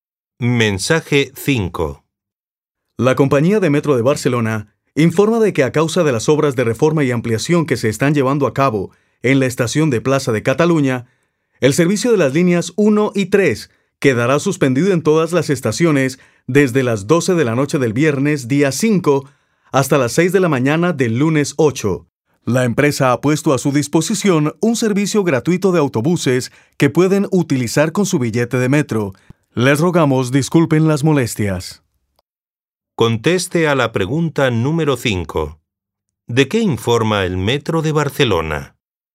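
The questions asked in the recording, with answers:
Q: ¿De qué informa el Metro de Barcelona?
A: De la suspensión de las líneas 1 y 3 durante el fin de semana por obras, con autobuses gratuitos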